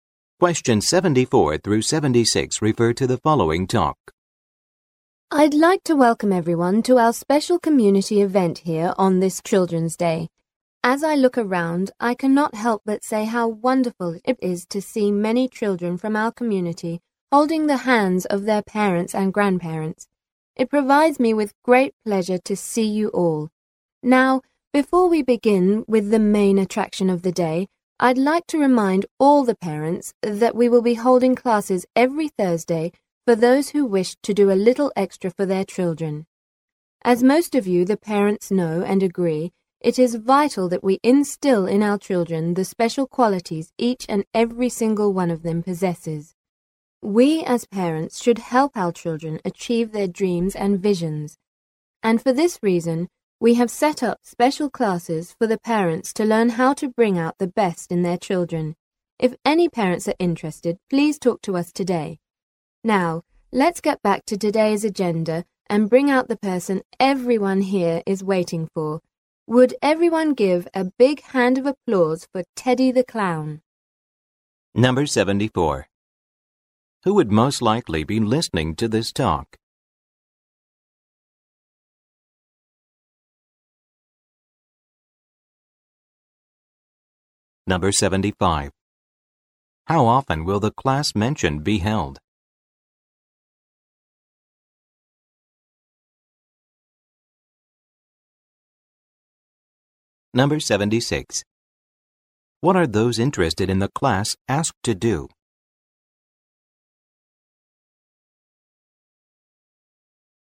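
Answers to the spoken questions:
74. Parents and children at a community Children's Day event
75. Every Thursday (weekly)
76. Talk to the organizers today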